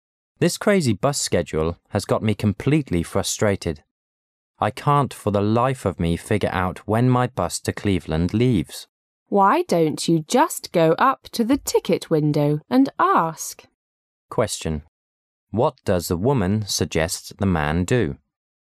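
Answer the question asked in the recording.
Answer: Ask at the ticket window

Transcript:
[解析] M: This crazy bus schedule has got me completely frustrated. I can't for the life of me figure out when my bus to Cleveland leaves. W: Why don't you just go up to the ticket window and ask? Q: What does the woman suggest the man do?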